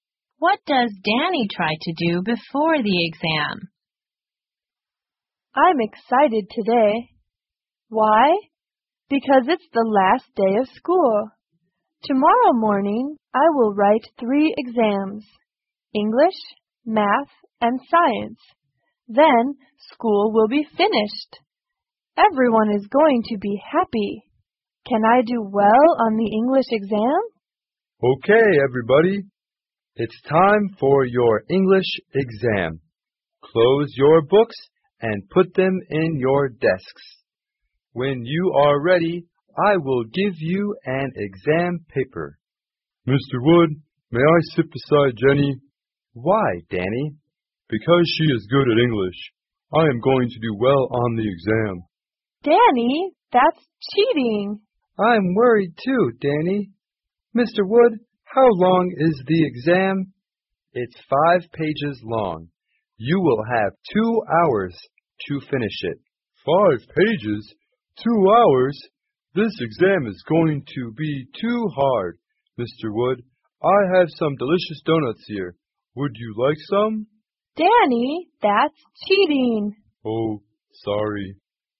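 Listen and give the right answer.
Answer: He tries to cheat: he asks to sit beside Jenny and offers Mr. Wood donuts.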